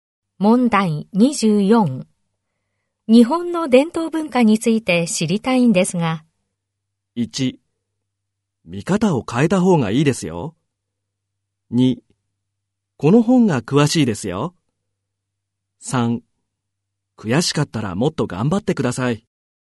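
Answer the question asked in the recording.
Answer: 2: この本が詳しいですよ。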